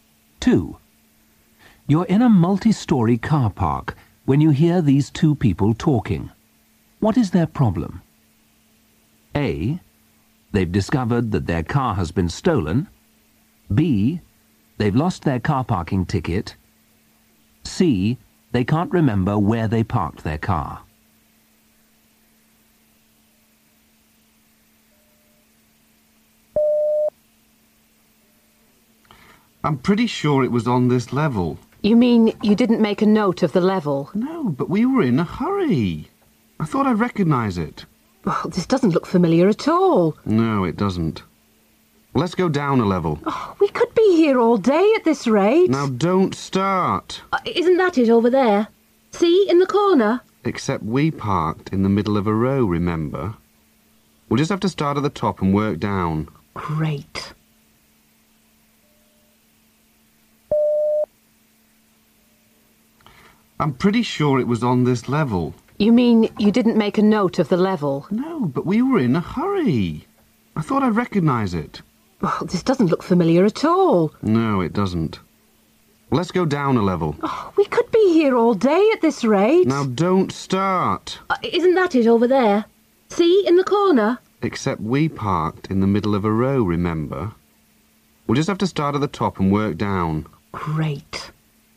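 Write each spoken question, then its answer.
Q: What is their problem?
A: C: They can't remember where they parked their car.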